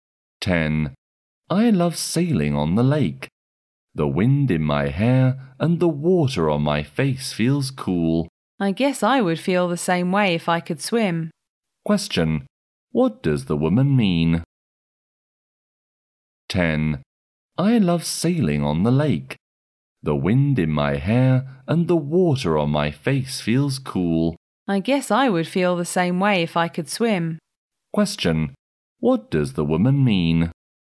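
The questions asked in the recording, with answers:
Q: What does the woman mean?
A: She can't swim, so she doesn't enjoy sailing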